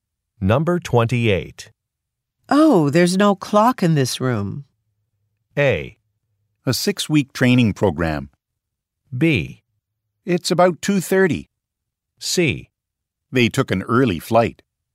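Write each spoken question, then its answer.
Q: Oh, there's no clock in this room.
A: B: It's about 2:30.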